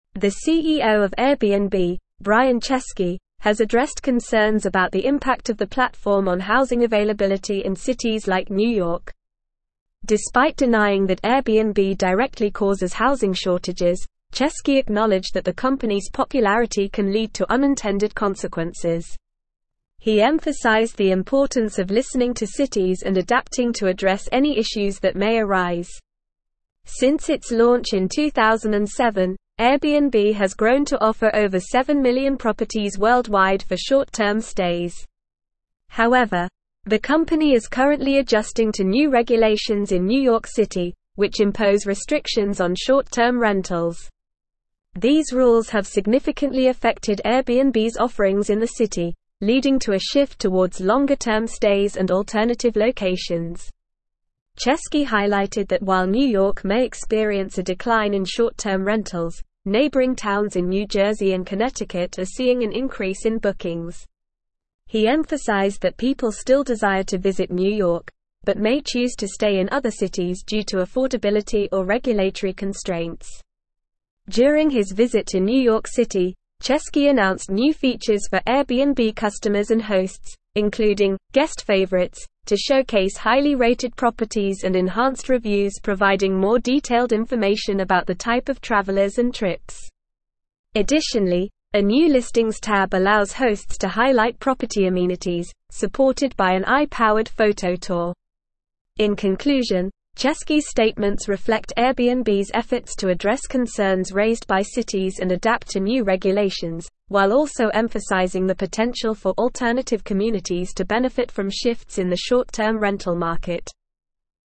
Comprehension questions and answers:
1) The CEO of Airbnb, Brian (1)______, has addressed concerns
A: Chesky

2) concerns about the impact of the (2)______ on (3)______ availability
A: platform

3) on (3)______ availability in cities like New York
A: housing

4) Chesky (4)______ that the company's popularity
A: acknowledged

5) over seven million (5)______ worldwide for short-term stays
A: properties

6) These rules have significantly (6)______ Airbnb's offerings in the city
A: affected

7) (7)______ to a shift towards longer-term stays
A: leading

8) longer-term stays and (8)______ locations.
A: alternative

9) (9)______ towns in New (10)______ and Connecticut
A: neighboring

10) towns in New (10)______ and Connecticut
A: Jersey

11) are seeing an (11)______ in bookings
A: increase

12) may choose to stay in other (12)______ due to affordability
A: cities

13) providing more (13)______ information about the type of travelers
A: detailed

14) allows hosts to highlight (14)______ amenities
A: property

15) Chesky's statements reflect Airbnb's (15)______ to address concerns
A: efforts

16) shifts in the short-term (16)______ market.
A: rental

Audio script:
The CEO of Airbnb, Brian Chesky, has addressed concerns about the impact of the platform on housing availability in cities like New York. Despite denying that Airbnb directly causes housing shortages, Chesky acknowledged that the company's popularity can lead to unintended consequences. He emphasized the importance of listening to cities and adapting to address any issues that may arise.
Since its launch in 2007, Airbnb has grown to offer over seven million properties worldwide for short-term stays. However, the company is currently adjusting to new regulations in New York City, which impose restrictions on short-term rentals. These rules have significantly affected Airbnb's offerings in the city, leading to a shift towards longer-term stays and alternative locations.
Chesky highlighted that while New York may experience a decline in short-term rentals, neighboring towns in New Jersey and Connecticut are seeing an increase in bookings. He emphasized that people still desire to visit New York, but may choose to stay in other cities due to affordability or regulatory constraints.
During his visit to New York City, Chesky announced new features for Airbnb customers and hosts, including "Guest Favorites" to showcase highly-rated properties and enhanced reviews providing more detailed information about the type of travelers and trips. Additionally, a new listings tab allows hosts to highlight property amenities, supported by an AI-powered photo tour.
In conclusion, Chesky's statements reflect Airbnb's efforts to address concerns raised by cities and adapt to new regulations, while also emphasizing the potential for alternative communities to benefit from shifts in the short-term rental market.

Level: Level 4